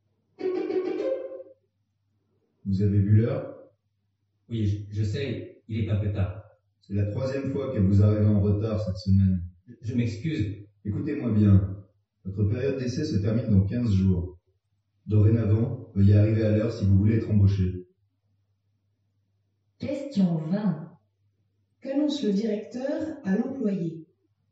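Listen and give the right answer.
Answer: Qu'il doit arriver à l'heure s'il veut être embauché.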